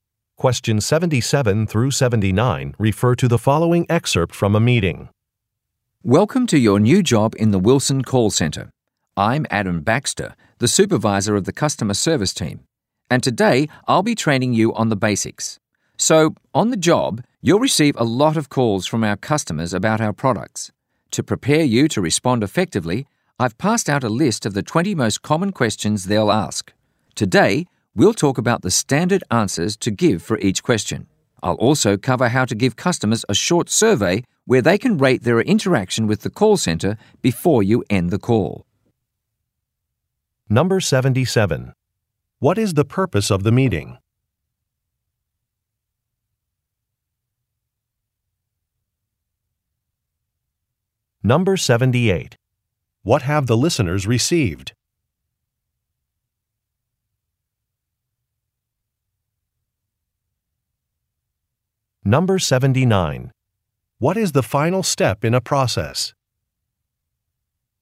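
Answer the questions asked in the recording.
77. To train new employees
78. A list of common customer questions
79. Giving customers a short survey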